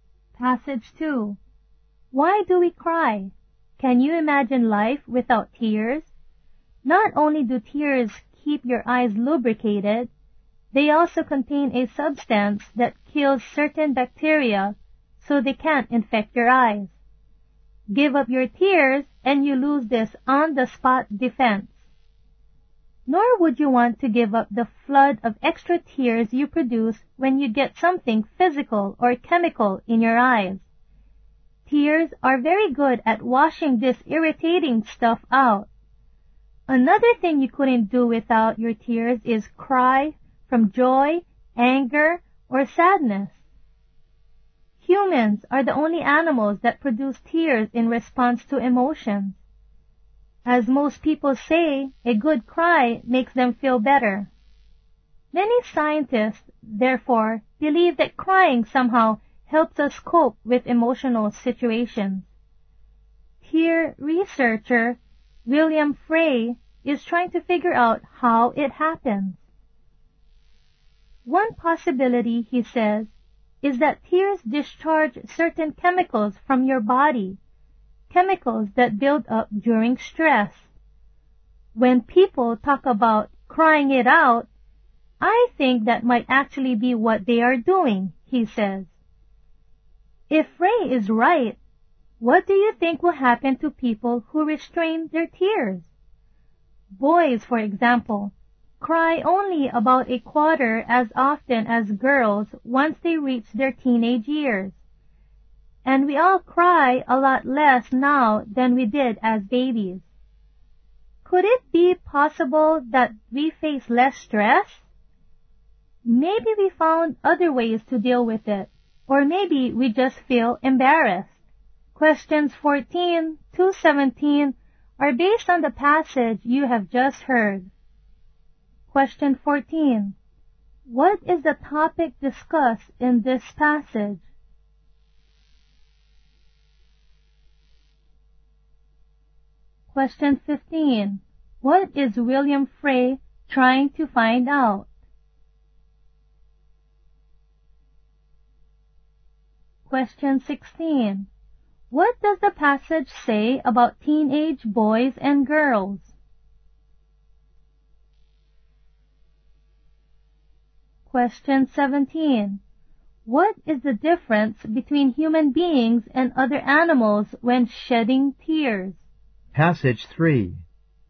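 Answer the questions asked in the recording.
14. Why we cry (what tears do).
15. How crying helps us cope with emotional situations.
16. Teenage boys cry only about a quarter as often as girls.
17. Only humans shed tears in response to emotions.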